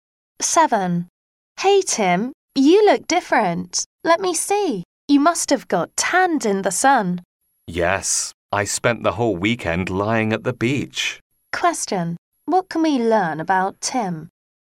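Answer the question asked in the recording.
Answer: He got tanned lying on the beach all weekend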